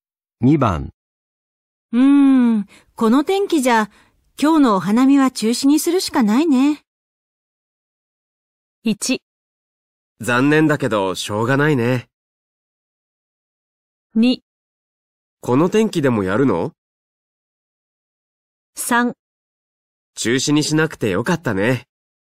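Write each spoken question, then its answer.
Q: この天気じゃ今日のお花見は中止にするしかないね。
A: 1: 残念だけどしょうがないね。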